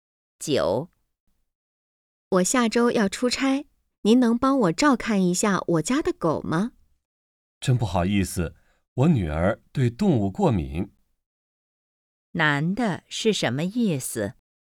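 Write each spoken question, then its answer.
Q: 男的是什么意思?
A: 不能帮忙照看狗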